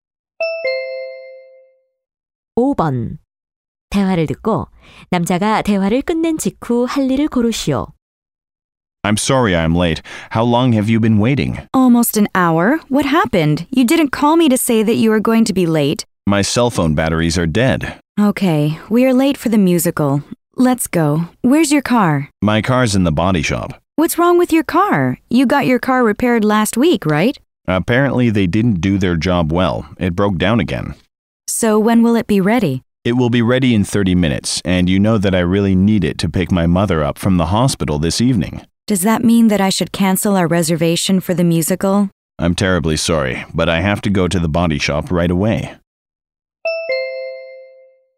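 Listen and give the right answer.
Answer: 정비소에 가기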